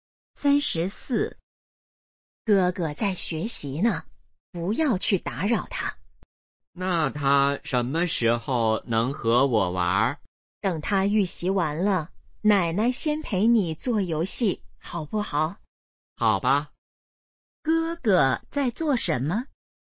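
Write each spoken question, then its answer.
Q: 哥哥在做什么?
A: 预习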